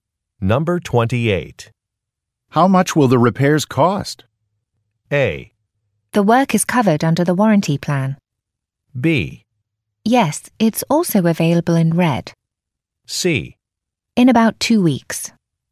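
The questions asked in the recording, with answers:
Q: How much will the repairs cost?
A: A: The work is covered under the warranty plan.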